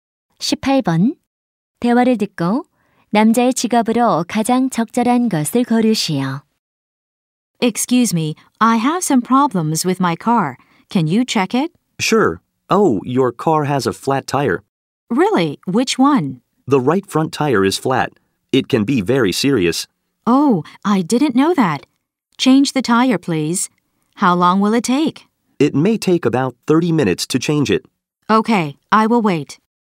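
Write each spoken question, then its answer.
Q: 대화를 듣고 남자의 직업으로 가장 적절한 것을 고르시오.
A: 자동차 정비사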